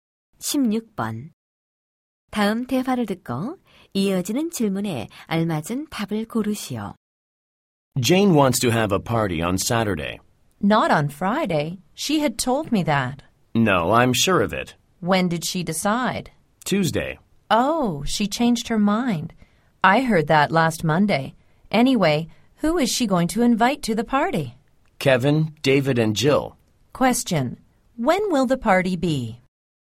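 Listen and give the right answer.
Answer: On Saturday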